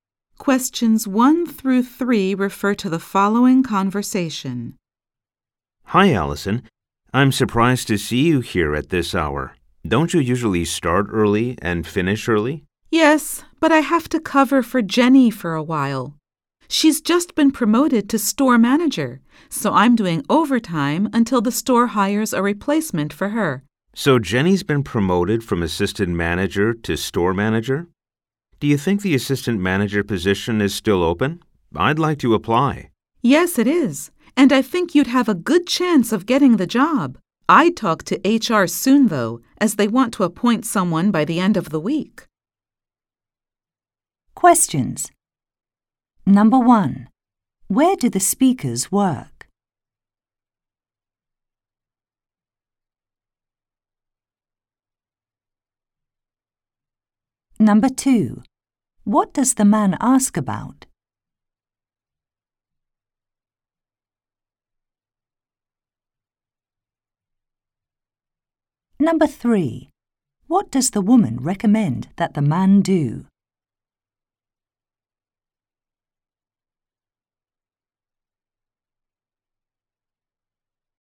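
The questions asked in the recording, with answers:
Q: Where do the speakers work?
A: At a store

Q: What does the man ask about?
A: Whether the assistant manager position is still open

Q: What does the woman recommend that the man do?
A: Talk to HR soon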